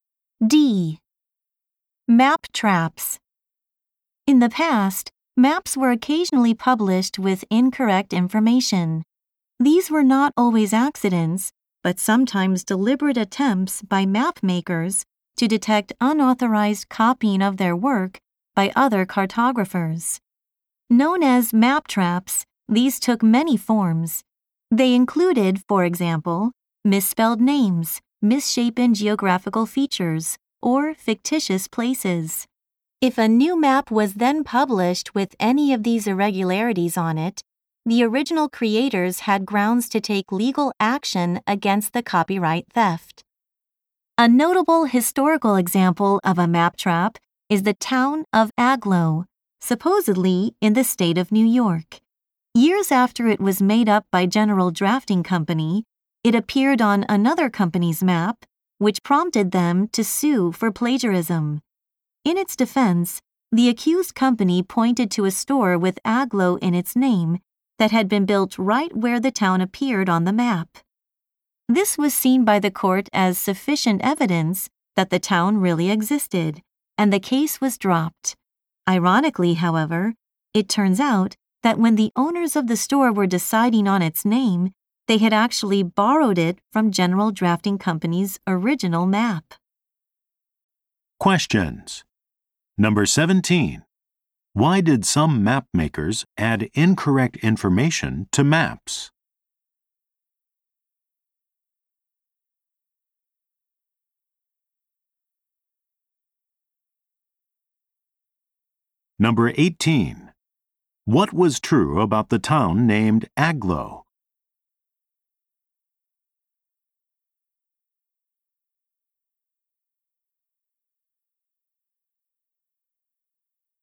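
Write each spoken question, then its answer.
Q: Why did some map makers add incorrect information to maps?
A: To find out if other map makers copied their work.

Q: What was true about the town named Agloe?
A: It was made up, and a store took its name from the original map.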